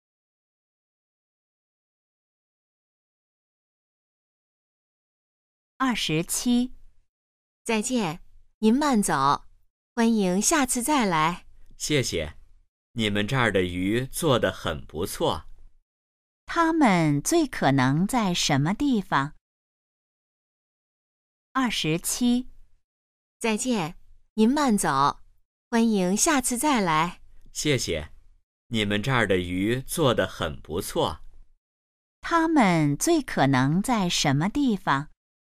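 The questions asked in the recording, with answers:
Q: 他们最可能在什么地方?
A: 饭馆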